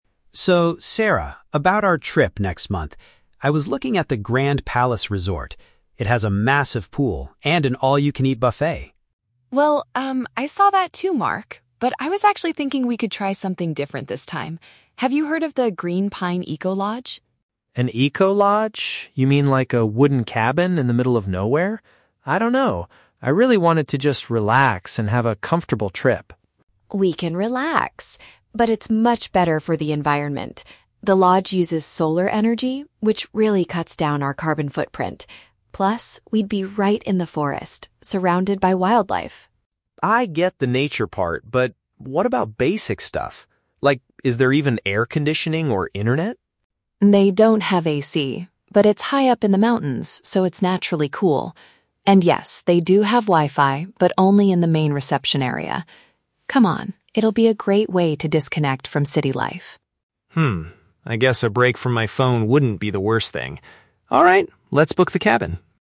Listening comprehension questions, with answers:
Listen to two friends talking about their upcoming vacation. Choose the correct answer (A, B, or C) for each question.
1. What does Mark originally want to do for their vacation?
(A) Stay in a forest cabin.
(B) Sleep at a luxury hotel.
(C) Go camping in the mountains.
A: Sleep at a luxury hotel.

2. Why does Sarah prefer the Green Pine Eco-lodge?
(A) It is much cheaper than the resort.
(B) It is less harmful to nature.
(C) It offers free Wi-Fi everywhere.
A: It is less harmful to nature.

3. How does Mark feel about the eco-lodge at the end of the conversation?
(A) He accepts the idea of taking a break from technology.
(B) He is angry that the room does not have air conditioning.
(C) He is worried about the hot weather in the forest.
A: He accepts the idea of taking a break from technology.

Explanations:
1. Mark says he was looking at the "Grand Palace Resort" which has a "massive pool" and a "buffet" (paraphrased as "luxury hotel"). Why traps are wrong: Option A is Sarah's idea, not Mark's. Option C is plausible for a nature trip, but neither of them mentions camping in a tent.
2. Sarah says the eco-lodge is "much better for the environment" because it uses "solar energy" and "cuts down our carbon footprint" (paraphrased as "less harmful to nature"). Why traps are wrong: Option A is incorrect because they never talk about prices or which place is cheaper. Option C is wrong because the Wi-Fi is only in the "main reception area", not everywhere.
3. At the end, Mark says "a break from my phone wouldn't be the worst thing" and agrees to book the cabin. Why traps are wrong: Option B is incorrect because although he asks about AC, he is not angry; he just wants to know about basic things. Option C is incorrect because Sarah tells him the mountains are "naturally cool", and he does not express worry about the heat after that.

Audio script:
Mark: So, Sarah, about our trip next month... I was looking at the Grand Palace Resort. It has a massive pool and an all-you-can-eat buffet.
Sarah: Well, um, I saw that too, Mark. But I was actually thinking we could try something different this time. Have you heard of the Green Pine Eco-lodge?
Mark: An eco-lodge? You mean, like a wooden cabin in the middle of nowhere? I don't know... I really wanted to just relax and have a comfortable trip.
Sarah: We can relax! But it's much better for the environment. The lodge uses solar energy, which really cuts down our carbon footprint. Plus, we'd be right in the forest, surrounded by wildlife.
Mark: I get the nature part, but... what about basic stuff? Like, is there even air conditioning or internet?
Sarah: They don't have AC, but it's high up in the mountains so it's naturally cool. And yes, they do have Wi-Fi, but only in the main reception area. Come on, it'll be a great way to disconnect from city life.
I guess a break from my phone wouldn't be the worst thing. Alright, let's book the cabin.

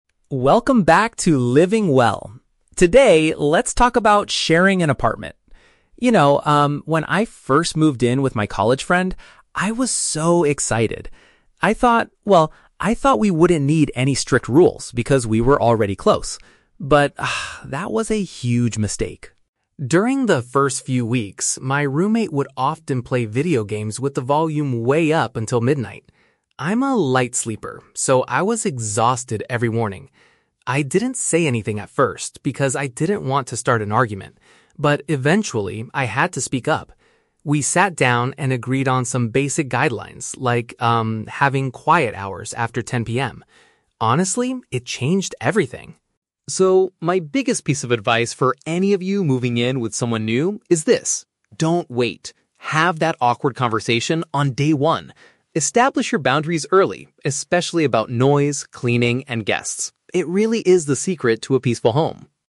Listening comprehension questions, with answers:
Listen to a podcast host talking about living with a roommate. Then, read the questions and choose the correct answer (A, B, or C).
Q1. What was the main problem with the host's roommate at first?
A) The roommate invited too many friends over.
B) The roommate made too much noise late at night.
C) They argued a lot about cleaning the apartment.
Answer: The roommate made too much noise late at night.

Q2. Why didn't the host complain about the problem immediately?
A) They wanted to avoid a fight with their friend.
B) They thought the roommate would move out soon.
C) They were too tired to care about the situation.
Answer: They wanted to avoid a fight with their friend.

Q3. What is the host's main advice for people sharing an apartment?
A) You should only choose to live with close friends.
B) You must go to sleep before 10 PM every night.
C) You need to make clear agreements on the first day.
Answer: You need to make clear agreements on the first day.

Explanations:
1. The speaker mentions that the roommate would "play video games with the volume way up until midnight." This means they were making a lot of noise late at night. Trap A: Incorrect. The speaker mentions "guests" at the end as a general tip, but did not say their roommate invited friends over. Trap C: Incorrect. The speaker explicitly says they "didn't want to start an argument," so they did not argue at first. "Cleaning" is also just a general example mentioned at the end.
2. The host says, "I didn't say anything at first because I didn't want to start an argument." "Avoid a fight" is a paraphrase of "didn't want to start an argument." Trap B: Incorrect. This is a plausible idea but is never mentioned in the audio. Trap C: Incorrect. The host mentions being "exhausted" (tired), but this was the result of the noise, not the reason why they kept quiet.
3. The host advises listeners to "Have that awkward conversation on day one" and "Establish your boundaries early." This means making clear rules or agreements immediately. Trap A: Incorrect. The host moved in with a "college friend," but they say this actually led to a "huge mistake" because they assumed they didn't need rules. Trap B: Incorrect. The audio mentions having "quiet hours after 10 PM" as an example of a rule, but it does not mean everyone must literally go to sleep before 10 PM.

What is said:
"Welcome back to 'Living Well'. Today, let's talk about sharing an apartment. You know, um, when I first moved in with my college friend, I was so excited. I thought... well, I thought we wouldn't need any strict rules because we were already close. But, ah, that was a huge mistake.
During the first few weeks, my roommate would often play video games with the volume way up until midnight. I'm a light sleeper, so I was exhausted every morning. I didn't say anything at first because I didn't want to start an argument. But eventually, I had to speak up. We sat down and agreed on some basic guidelines, like, um, having 'quiet hours' after 10 PM. Honestly, it changed everything.
So, my biggest piece of advice for any of you moving in with someone new is this: don't wait. Have that awkward conversation on day one. Establish your boundaries early, especially about noise, cleaning, and guests. It really is the secret to a peaceful home."

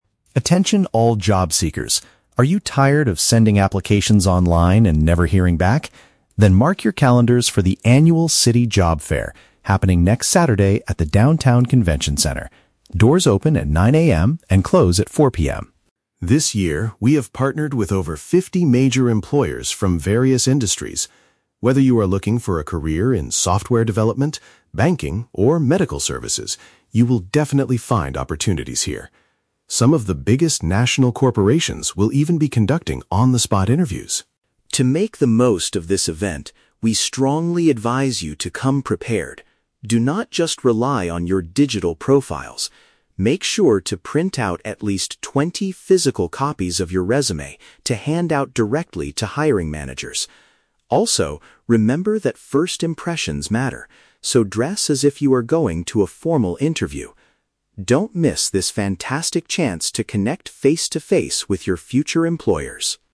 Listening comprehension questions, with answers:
Listen to a radio announcement about an upcoming job fair and choose the correct answer (A, B, or C) for each question.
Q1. What is the main advantage of attending this event?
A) Candidates can apply for jobs online much faster.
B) Candidates can speak directly with potential employers.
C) Candidates will receive free medical services at the center.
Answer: Candidates can speak directly with potential employers.

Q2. What kinds of companies will be present at the fair?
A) Businesses related to technology, finance, and healthcare.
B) Small, local startup companies looking for interns.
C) Travel agencies focusing strictly on overseas employment.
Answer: Businesses related to technology, finance, and healthcare.

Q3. What does the speaker highly recommend that attendees do?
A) Update their online digital profiles before arriving.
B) Buy a new set of formal clothes for the event.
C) Prepare multiple paper versions of their work history.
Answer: Prepare multiple paper versions of their work history.

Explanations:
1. Mark mentions that corporations will be "conducting on-the-spot interviews" and urges attendees to "connect face-to-face with your future employers". Option (B) correctly paraphrases this. Option (A) is The Trap: He mentions "sending applications online" at the beginning, but as a negative/frustrating experience that the job fair will solve. Option (C) is The Trap: "Medical services" is mentioned, but as an industry that is hiring, not as a free service provided to attendees.
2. The speaker lists the industries as "software development, banking, or medical services". Option (A) uses direct synonyms to group these fields (software development = technology; banking = finance; medical services = healthcare). Option (B) is incorrect because he mentions "major employers" and "national corporations", not small startups. Option (C) is not mentioned.
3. Mark advises attendees to "print out at least twenty physical copies of your resume". Option (C) is a perfect paraphrase (multiple = at least twenty; paper versions = physical copies; work history = resume). Option (A) is The Trap: He explicitly says "Do not just rely on your digital profiles." Option (B) is The Trap: He says "dress as if you are going to a formal interview", but he does not tell them to buy new clothes.

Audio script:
Mark: Attention all job seekers! Are you tired of sending applications online and never hearing back? Then mark your calendars for the Annual City Job Fair, happening next Saturday at the downtown Convention Center. Doors open at 9 AM and close at 4 PM.
This year, we have partnered with over fifty major employers from various industries. Whether you are looking for a career in software development, banking, or medical services, you will definitely find opportunities here. Some of the biggest national corporations will even be conducting on-the-spot interviews.
To make the most of this event, we strongly advise you to come prepared. Do not just rely on your digital profiles. Make sure to print out at least twenty physical copies of your resume to hand out directly to hiring managers. Also, remember that first impressions matter, so dress as if you are going to a formal interview. Don't miss this fantastic chance to connect face-to-face with your future employers!

